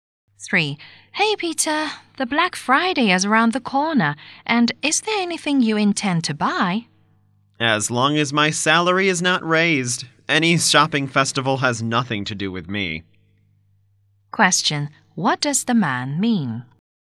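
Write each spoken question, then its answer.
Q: Question, what does the man mean?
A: He won't buy anything unless his salary is raised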